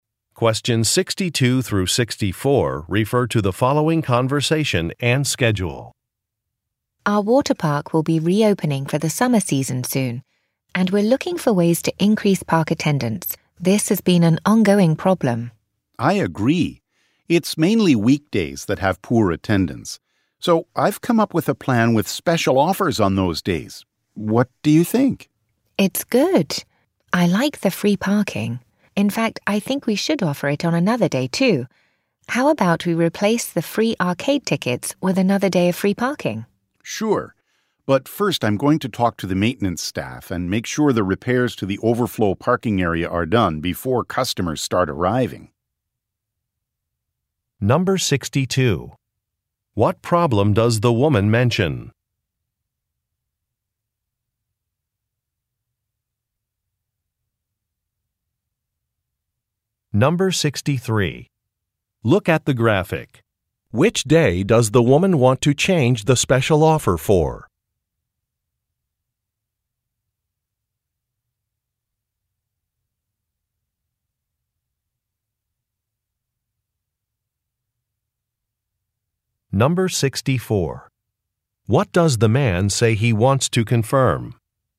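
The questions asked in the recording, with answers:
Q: What problem does the woman mention?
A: Park attendance is low.

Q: What does the man say he wants to confirm?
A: That repairs to the overflow parking area are finished before customers arrive.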